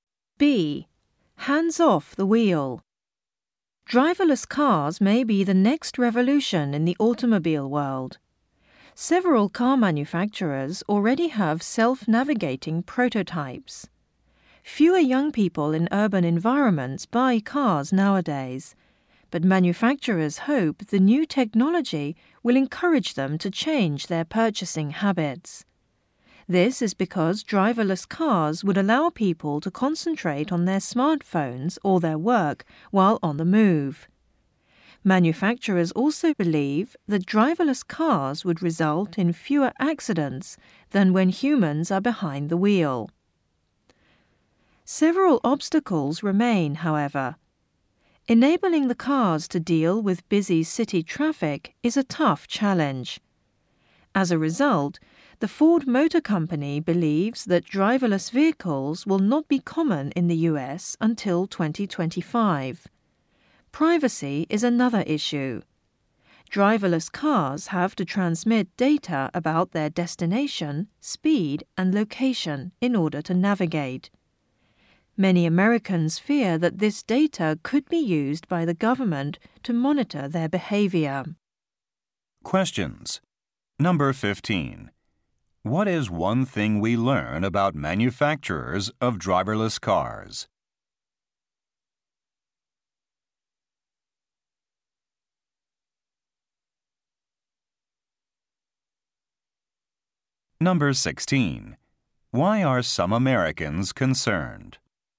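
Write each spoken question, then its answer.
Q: What is one thing we learn about manufacturers of driverless cars?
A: They hope to get more young urban people to buy cars

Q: Why are some Americans concerned?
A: The government could use car data to monitor them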